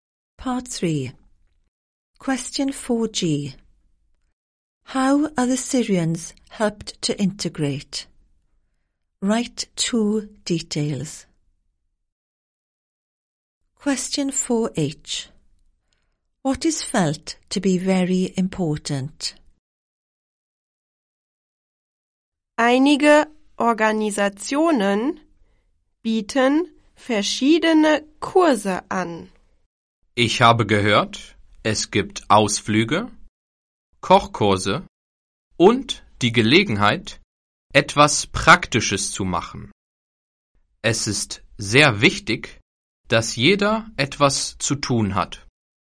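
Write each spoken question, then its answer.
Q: How are the Syrians helped to integrate?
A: Courses, excursions, cooking courses, chance to do something practical

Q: What is felt to be very important?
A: That everyone has something to do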